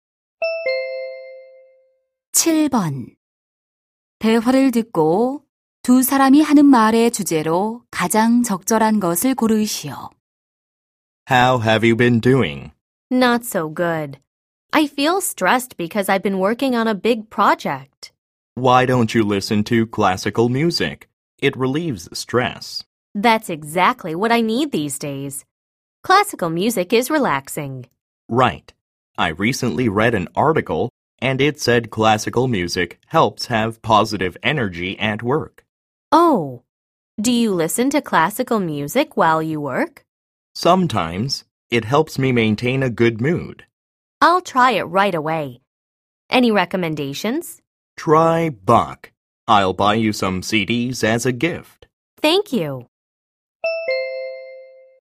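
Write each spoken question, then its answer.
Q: 대화를 듣고 두 사람이 하는 말의 주제로 가장 적절한 것을 고르시오.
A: 클래식 음악의 스트레스 해소 효과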